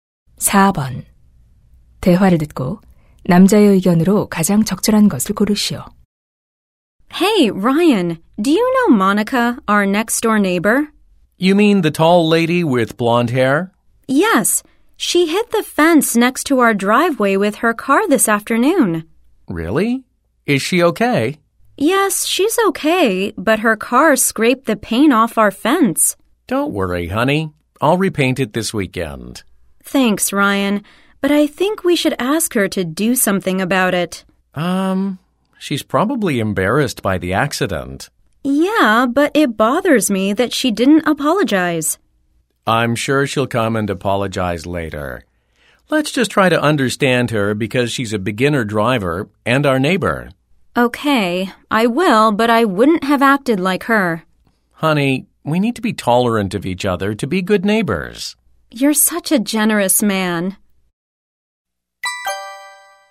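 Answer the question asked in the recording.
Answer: 좋은 이웃이 되려면 서로 관대해야 한다.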